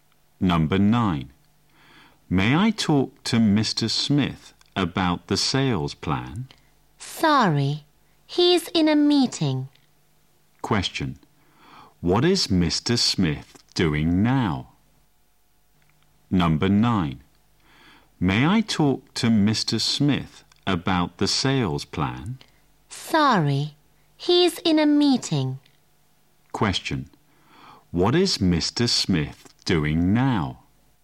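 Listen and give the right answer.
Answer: He is in a meeting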